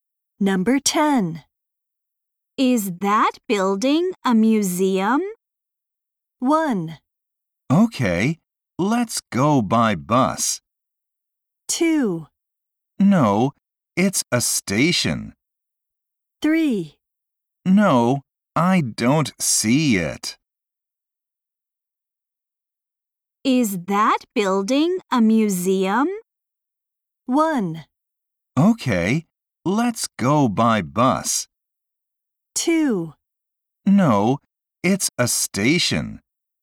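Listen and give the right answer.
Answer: 2: No, it's a station.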